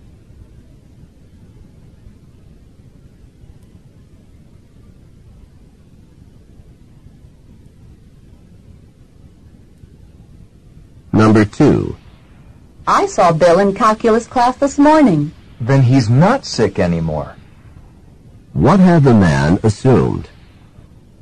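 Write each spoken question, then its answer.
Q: What had the man assumed?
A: That Bill was still sick.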